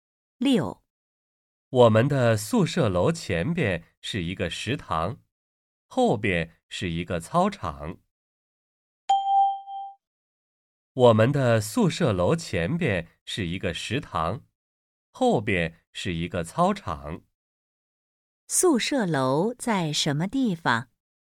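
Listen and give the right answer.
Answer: 在食堂后边,操场前边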